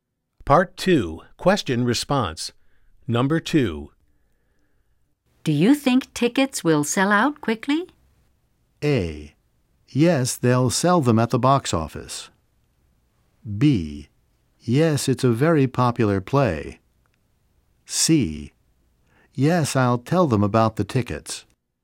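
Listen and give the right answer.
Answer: B: Yes, it's a very popular play.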